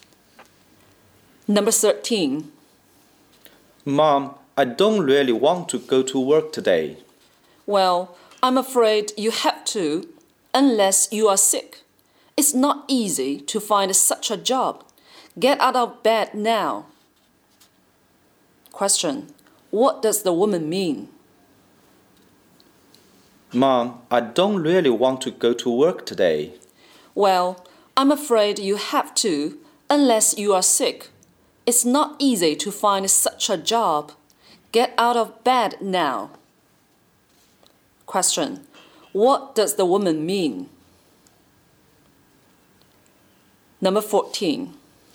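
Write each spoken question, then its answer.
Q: What does the woman mean?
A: Her son has to go to work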